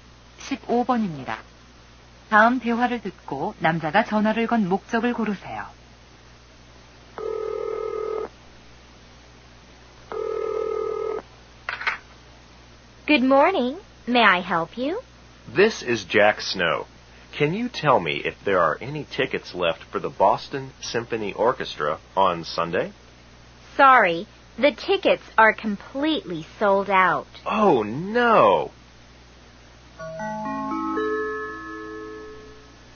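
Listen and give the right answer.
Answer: 보스턴 심포니 오케스트라 공연 표가 남아 있는지 문의하려고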